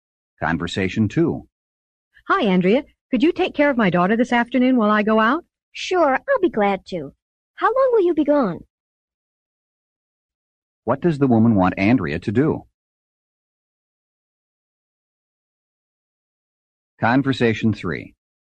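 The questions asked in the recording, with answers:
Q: What does the woman want Andrea to do?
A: Take care of her daughter this afternoon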